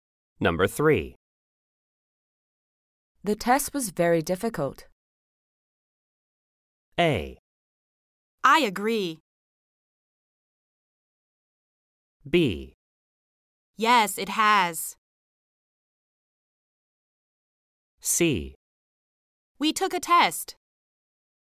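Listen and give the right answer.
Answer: A: I agree.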